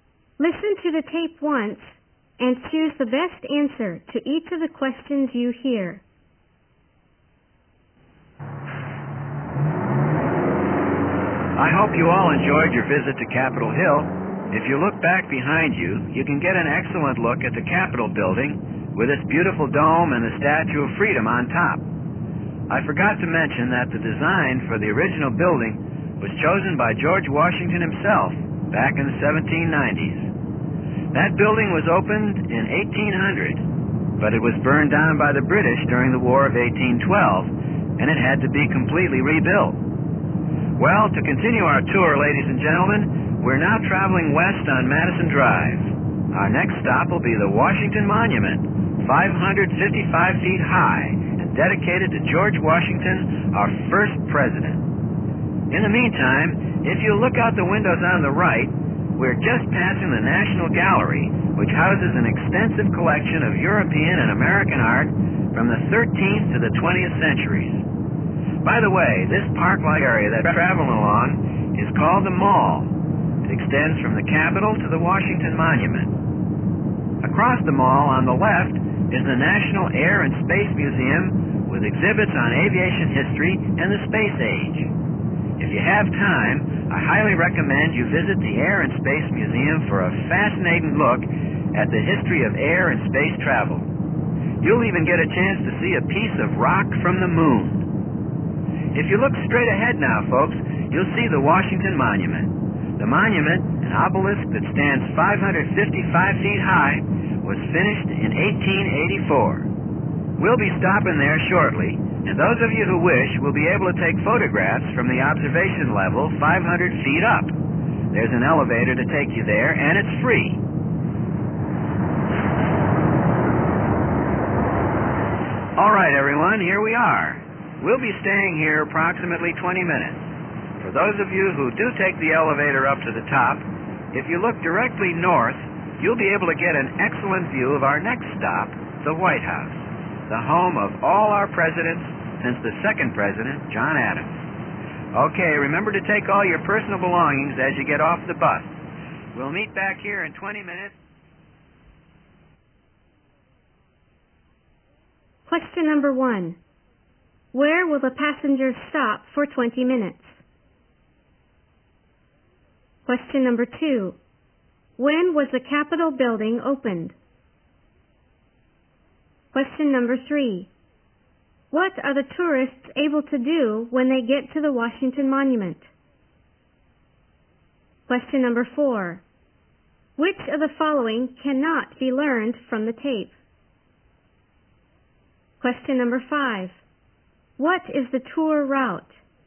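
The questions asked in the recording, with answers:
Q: Where will the passengers stop for 20 minutes?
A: At the Washington Monument

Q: When was the Capitol building opened?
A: In 1800

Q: What are the tourists able to do when they get to the Washington Monument?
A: Take the free elevator up and take photographs from the observation level 500 feet up

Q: What is the tour route?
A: From Capitol Hill west along Madison Drive and the Mall to the Washington Monument, then on to the White House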